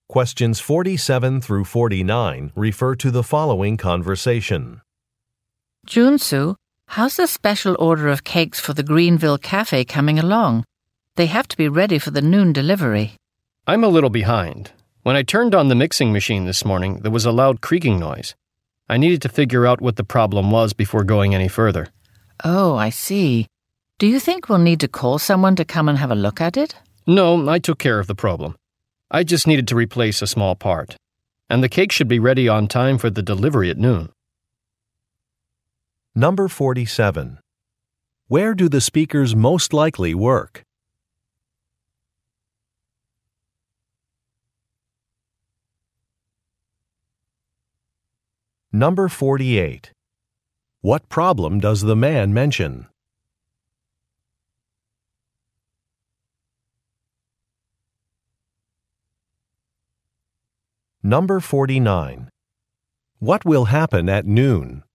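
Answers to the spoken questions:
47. At a bakery
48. The mixing machine made a loud creaking noise
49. A cake order will be delivered to the Greenville Cafe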